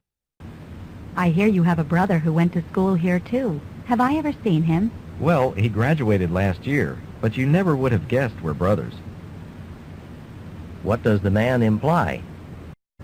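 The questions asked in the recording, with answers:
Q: What does the man imply?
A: He and his brother are very different.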